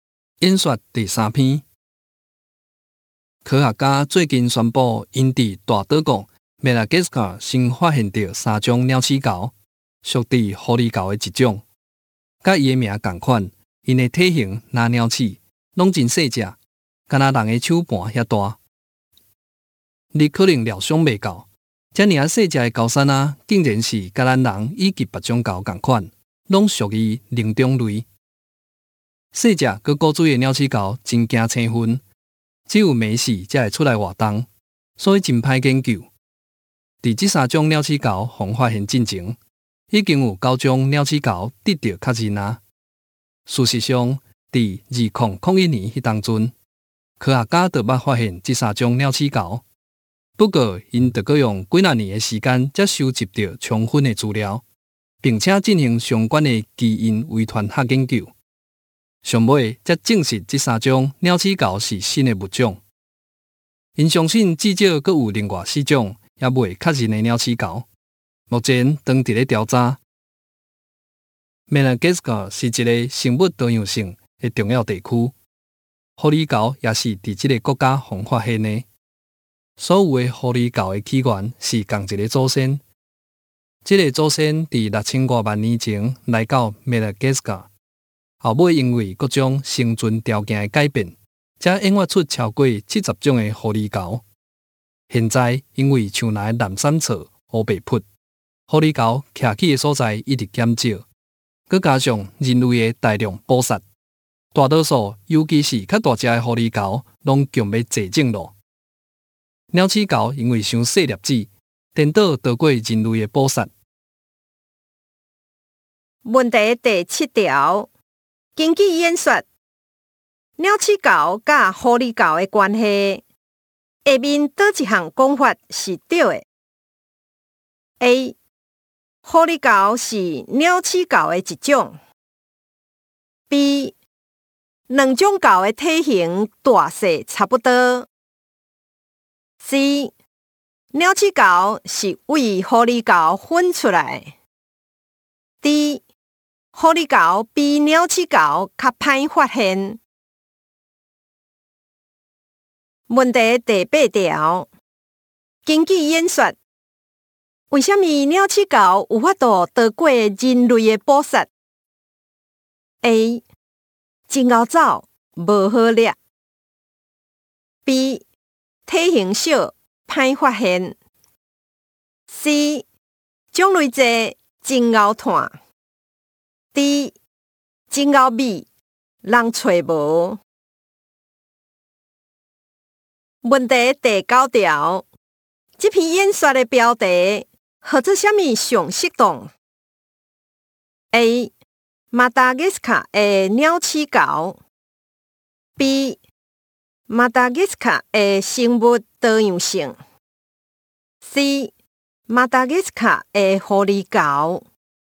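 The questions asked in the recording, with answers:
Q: 根据演说,鸟齿猴佮狐狸猴的关系,下面倒一项讲法是对的 ?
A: C: 鸟齿猴是为狐狸猴分出来

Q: 根据演说。为什么鸟齿猴有法度躲过人类的捕杀,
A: B: 体型小,歹发现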